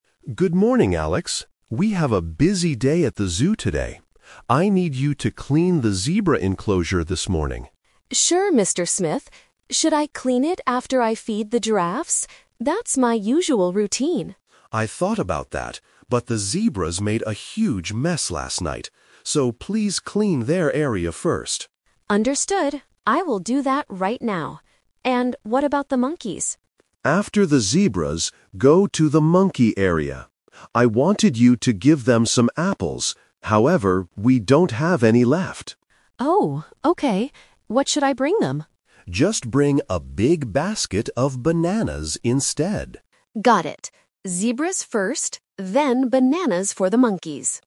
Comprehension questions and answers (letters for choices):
Listen to the conversation between a zoo manager and a zookeeper, and choose the correct answer (A, B, or C).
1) What must Alex do first this morning?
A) Feed the giraffes.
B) Clean the zebra enclosure.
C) Clean the monkey area.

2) Why does Alex need to take care of the zebras right away?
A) Because they are very hungry.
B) Because it is his usual morning routine.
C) Because they made a huge mess last night.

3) What will Alex bring to the monkeys?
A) Apples.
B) Bananas.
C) Peanuts.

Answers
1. B
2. C
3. B

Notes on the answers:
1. The manager says, "please clean their area first" referring to the zebras. Option (A) is the trap; feeding the giraffes is Alex's "usual routine," but the manager changes the plan today (The Twist). Option (C) is a distractor because Alex only needs to go to the monkey area later to feed them, not to clean.
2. The manager explicitly states, "the zebras made a huge mess last night." Option (B) is the trap because his usual routine is actually feeding the giraffes, not cleaning the zebras. Option (A) is plausible in a zoo context but is not mentioned in the audio.
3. The manager tells Alex to "bring a big basket of bananas instead." Option (A) is the trap; the manager wanted to give them apples, but they don't have any left. Option (C) is not mentioned.

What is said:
Manager: Good morning, Alex. We have a busy day at the zoo today. I need you to clean the zebra enclosure this morning.
Alex: Sure, Mr. Smith. Should I clean it after I feed the giraffes? That's my usual routine.
Manager: I thought about that, but the zebras made a huge mess last night. So, please clean their area first.
Alex: Understood. I will do that right now. And what about the monkeys?
Manager: After the zebras, go to the monkey area. I wanted you to give them some apples, however, we don't have any left.
Alex: Oh, okay. What should I bring them?
Manager: Just bring a big basket of bananas instead.